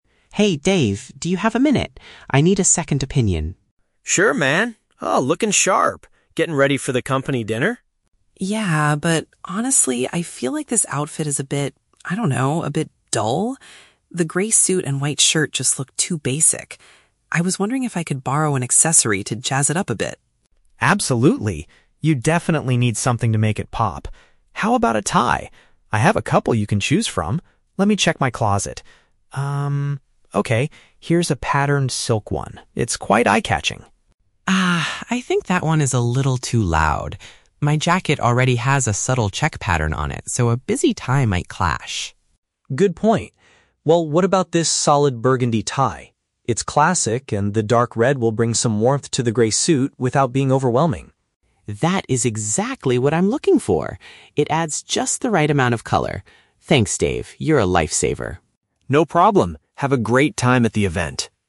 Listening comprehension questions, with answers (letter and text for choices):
Listen to the conversation between two roommates. For each question, choose the correct answer (A, B, or C).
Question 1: Why is Mark dissatisfied with his initial outfit?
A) He thinks it looks too plain and uninteresting.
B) He feels the suit is too tight and uncomfortable.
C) He believes his jacket's pattern is far too bright.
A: A) He thinks it looks too plain and uninteresting.

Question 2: What does Dave suggest to improve Mark's look?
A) Buying a completely new suit for the evening.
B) Wearing a piece of neckwear from his own collection.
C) Changing into a colorful patterned shirt.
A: B) Wearing a piece of neckwear from his own collection.

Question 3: Why does Mark refuse the first tie that Dave offers?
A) The dark red color doesn't look good on him.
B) It is made of cheap, low-quality material.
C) It doesn't match the design of his current jacket.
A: C) It doesn't match the design of his current jacket.

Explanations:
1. Mark states that his outfit is "a bit dull" and "too basic," which is paraphrased in option A as "plain and uninteresting." Option B is plausible but never mentioned. Option C is a trap because the word "loud" (bright/flashy) is used to describe the first tie, not his jacket; his jacket has a "subtle" pattern.
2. Dave says, "How about a tie? I have a couple you can choose from. Let me check my closet." "Tie" is paraphrased as "a piece of neckwear," and his closet represents his "own collection." Option A is not mentioned. Option C is a trap; the word "patterned" is mentioned, but Dave offers a patterned tie, not a shirt.
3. Mark rejects the first tie because it is "too loud" and might "clash" with the "check pattern" on his jacket. This means the designs do not go well together. Option A is a trap because Mark actually accepts the dark red (burgundy) tie. Option B is a trap; the tie is made of silk, which is usually high-quality, not cheap.

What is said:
Mark: Hey Dave, do you have a minute? I need a second opinion.
Dave: Sure, man. Oh, looking sharp! Getting ready for the company dinner?
Mark: Yeah. But honestly, I feel like this outfit is a bit... I don't know, a bit dull? The grey suit and white shirt just look too basic. I was wondering if I could borrow an accessory to jazz it up a bit?
Dave: Absolutely. You definitely need something to make it pop. How about a tie? I have a couple you can choose from. Let me check my closet. okay, here's a patterned silk one. It's quite eye-catching.
Mark: Ah, I think that one is a little too loud. My jacket already has a subtle check pattern on it, so a busy tie might clash.
Dave: Good point. Well, what about this solid burgundy tie? It's classic, and the dark red will bring some warmth to the grey suit without being overwhelming.
Mark: That is exactly what I'm looking for! It adds just the right amount of color.